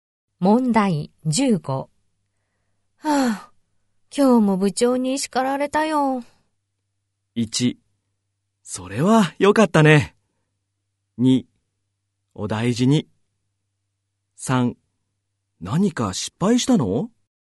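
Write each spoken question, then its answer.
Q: はぁ、今日も部長に叱られたよ。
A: 3: 何か失敗したの?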